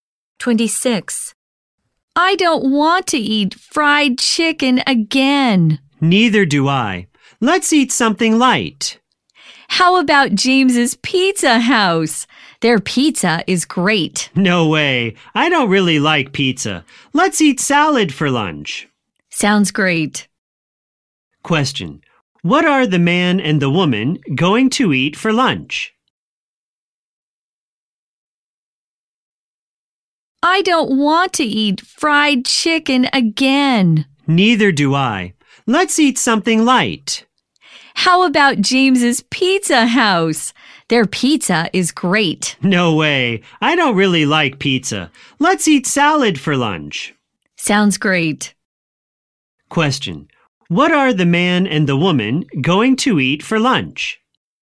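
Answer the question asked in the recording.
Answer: Salad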